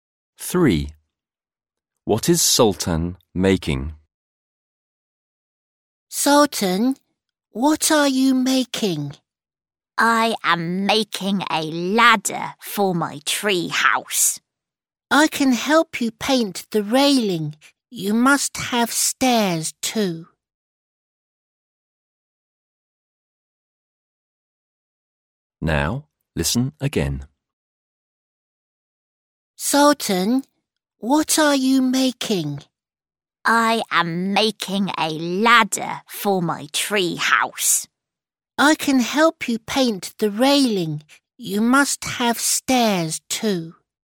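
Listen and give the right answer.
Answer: A ladder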